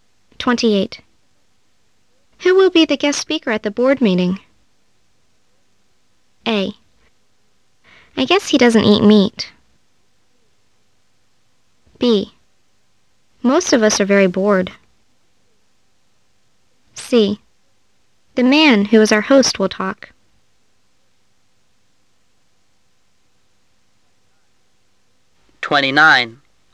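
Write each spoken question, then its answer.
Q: Who will be the guest speaker at the board meeting?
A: C: The man who is our host will talk.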